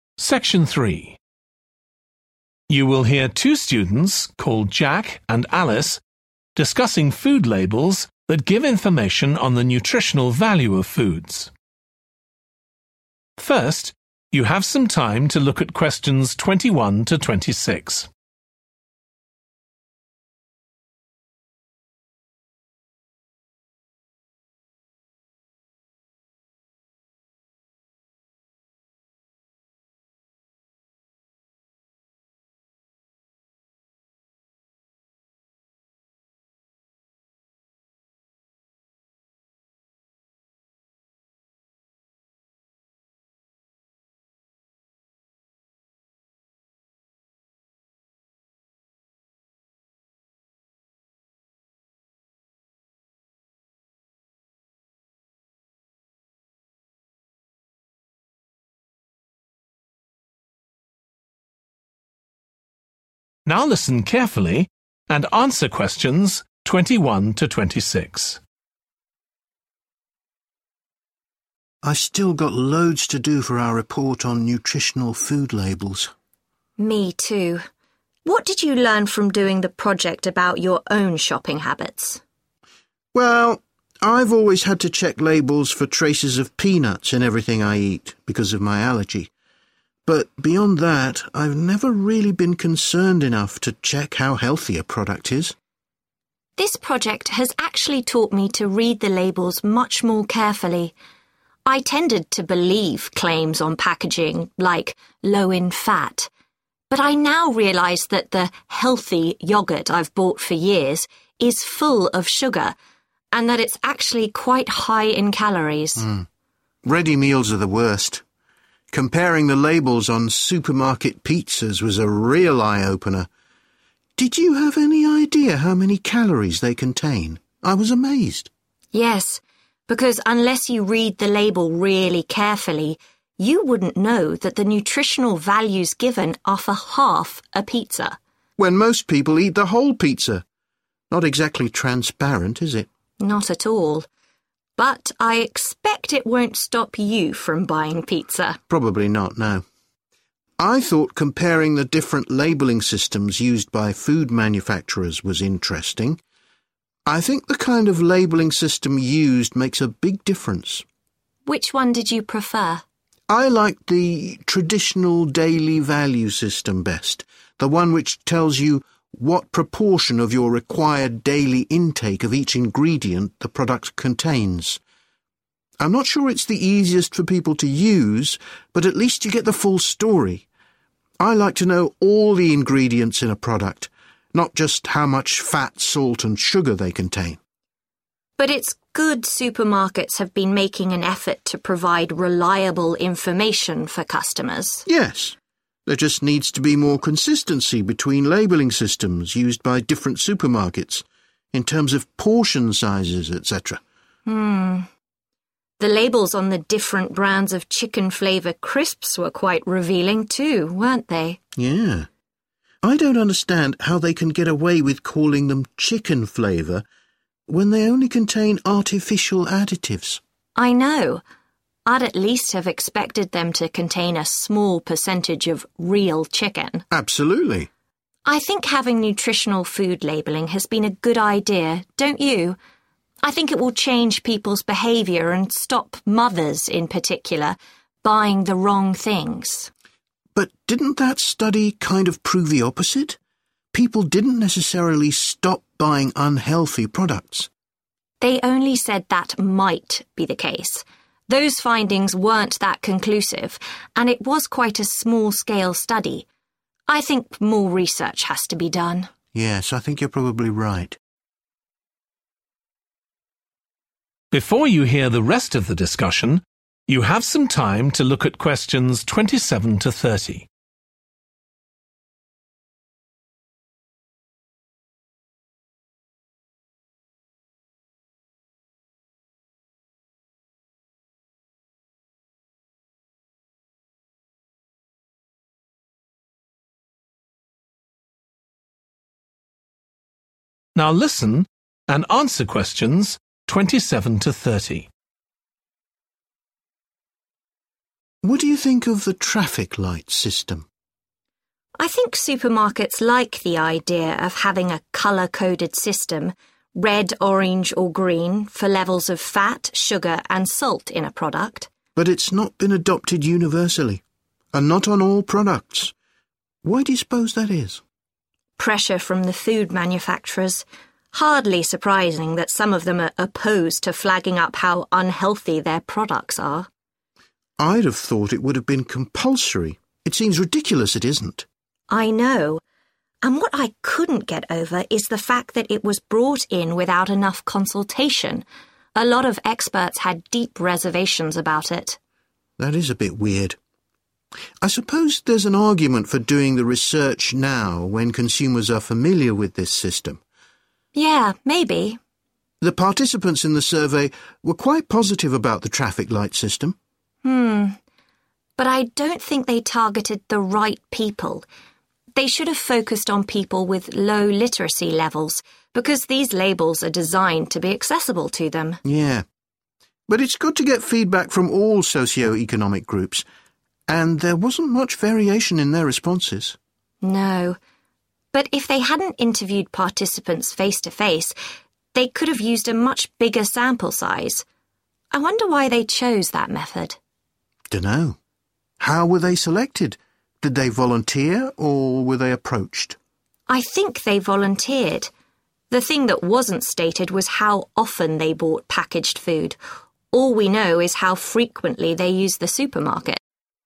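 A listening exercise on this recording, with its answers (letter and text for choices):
Choose the correct letter, A, B or C.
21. What was Jack's attitude to nutritional food labels before this project?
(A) He didn't read everything on them.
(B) He didn't think they were important.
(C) He thought they were too complicated.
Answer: (B) He didn't think they were important.

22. Alice says that before doing this project,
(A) she was unaware of what certain foods contained.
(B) she was too lazy to read food labels.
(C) she was only interested in the number of calories.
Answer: (A) she was unaware of what certain foods contained.

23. When discussing supermarket brands of pizza, Jack agrees with Alice that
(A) the list of ingredients is shocking.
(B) he will hesitate before buying pizza again.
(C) the nutritional label is misleading.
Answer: (C) the nutritional label is misleading.

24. Jack prefers the daily value system to other labelling systems because it is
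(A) more accessible.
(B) more logical.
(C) more comprehensive.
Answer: (C) more comprehensive.

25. What surprised both students about one flavour of crisps?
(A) The percentage of artificial additives given was incorrect.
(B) The products did not contain any meat.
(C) The labels did not list all the ingredients.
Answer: (B) The products did not contain any meat.

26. What do the students think about research into the impact of nutritional food labelling?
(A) It did not produce clear results.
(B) It focused on the wrong people.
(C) It made unrealistic recommendations.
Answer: (A) It did not produce clear results.

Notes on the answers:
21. But beyond that I've never really been concerned enough to check how healthy a product is.(Tôi chưa bao giờ thực sự quan tâm đến việc kiểm tra mức độ lành mạnh của một sản phẩm)
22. This project has actually taught me to read the labels much more carefully. 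I tended to believe claims on packaging like 'low in fat'. But I now realize that the 'healthy' yogurt I've bought for years is full of sugar and that it's actually quite high in calories. (Tôi có xu hướng tin vào những tuyên bố trên bao bì như "ít chất béo". Nhưng bây giờ tôi nhận ra rằng sữa chua 'tốt cho sức khỏe' mà tôi đã mua trong nhiều năm chứa đầy đường và nó thực sự chứa khá nhiều calo.)
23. Yes, because unless you read the label really carefully, you wouldn't know that the nutritional values given are for half a pizza.(Có, bởi vì trừ khi bạn đọc nhãn thực sự cẩn thận, bạn sẽ không biết rằng các giá trị dinh dưỡng có trong một nửa chiếc bánh pizza là bao nhiêu.)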